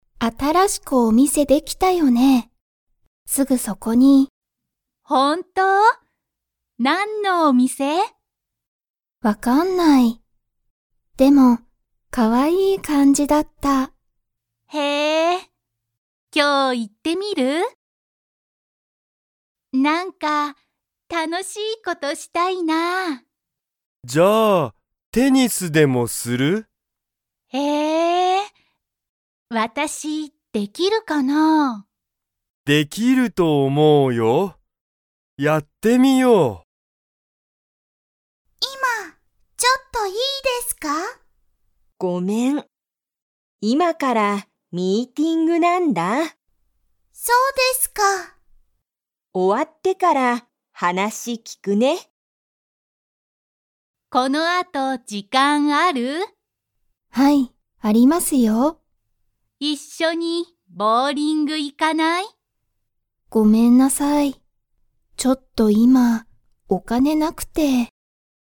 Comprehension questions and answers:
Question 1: そのお店みせは、____感かんじだった。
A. 高たかい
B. 安やすい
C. 楽たのしい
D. 可愛かわいい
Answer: D. 可愛かわいい

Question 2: ユウコは、楽たのしい事ことがしたいですか?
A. はい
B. いいえ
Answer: A. はい

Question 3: 松井まついさんは、____ミーティングがある。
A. 毎日まいにち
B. 今いまから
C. この前まえ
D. よく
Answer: B. 今いまから

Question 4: リカは、この後時間あとじかんがありますか?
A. はい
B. いいえ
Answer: A. はい

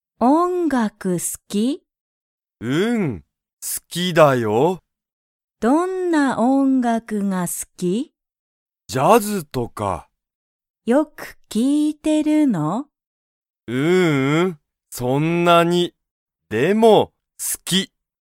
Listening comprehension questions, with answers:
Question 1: リョウは、ジャズが好すきですか?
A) はい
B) いいえ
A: A) はい

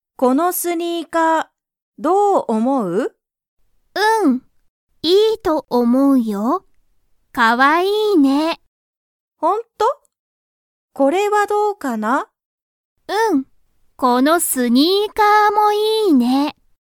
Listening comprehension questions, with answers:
リサは何なにをかわいいと思(おも)いますか?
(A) スマホ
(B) バッグ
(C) スニーカー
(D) ノート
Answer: (C) スニーカー

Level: Level 1

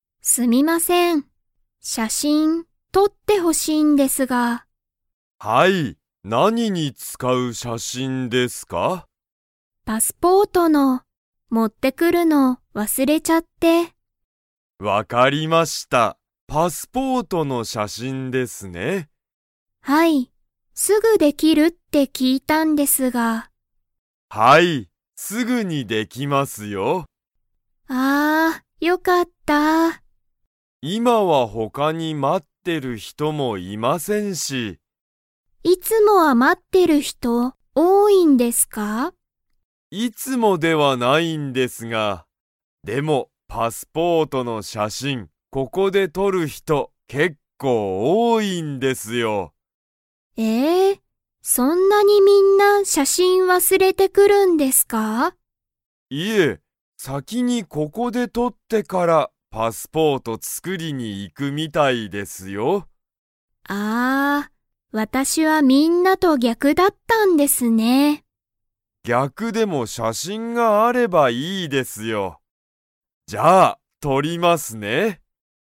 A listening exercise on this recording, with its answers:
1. ハルは、____に使(つか)う写真(しゃしん)を撮(と)ってほしい。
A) 映画(えいが)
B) レストラン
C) 仕事(しごと)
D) パスポート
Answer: D) パスポート

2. 写真(しゃしん)はすぐにできますか?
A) はい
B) いいえ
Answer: A) はい

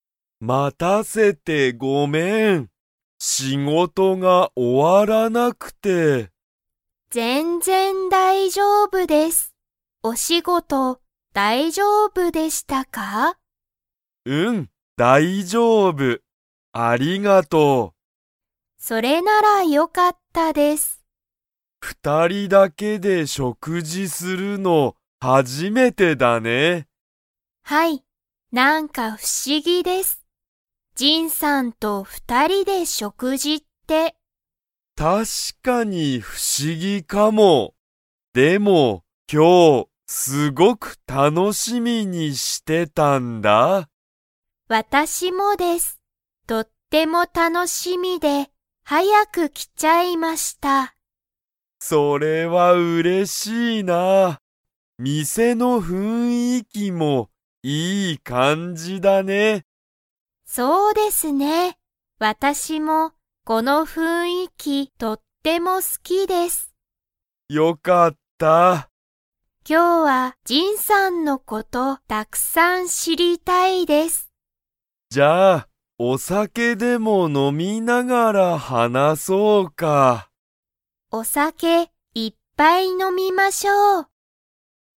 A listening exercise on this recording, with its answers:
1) ユカは、店みせに早はやく来きましたか?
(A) はい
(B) いいえ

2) ユカは、お店みせの がとっても好すきだ。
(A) 雰囲気ふんいき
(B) お花はな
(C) 仕事しごと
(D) お酒さけ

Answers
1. (A) はい
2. (A) 雰囲気ふんいき

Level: Level 3

